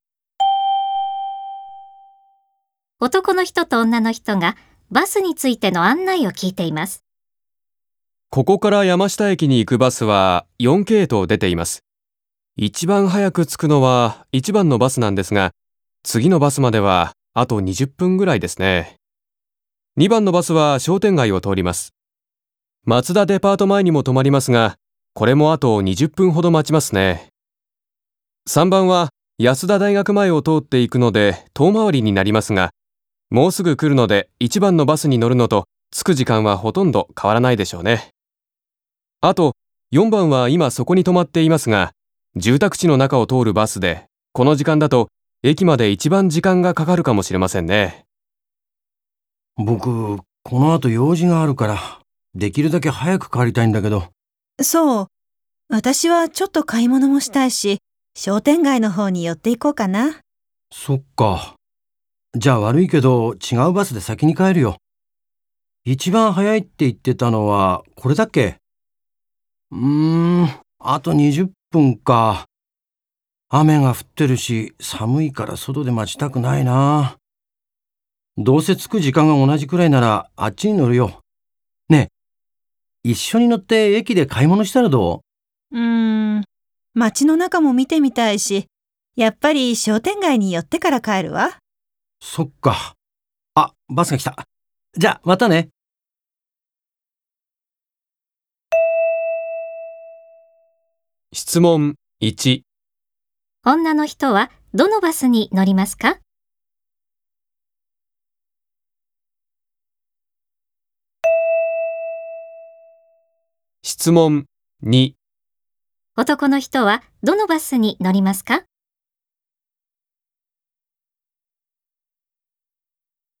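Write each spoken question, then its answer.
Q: 女の人はどのバスに乗りますか?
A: 2番のバス

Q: 男の人はどのバスに乗りますか?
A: 3番のバス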